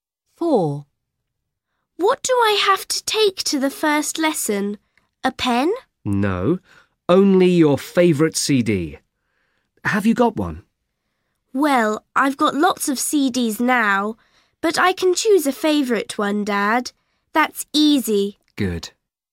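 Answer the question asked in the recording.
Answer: her favourite CD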